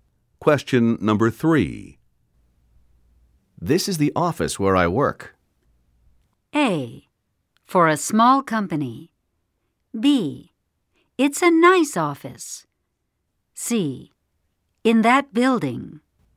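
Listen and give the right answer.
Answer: B: It's a nice office.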